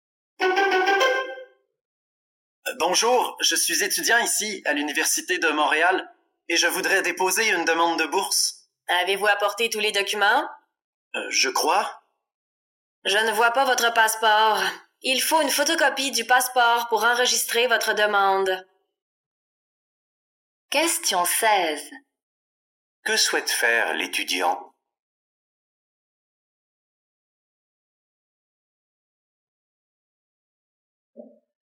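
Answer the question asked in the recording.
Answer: Déposer une demande de bourse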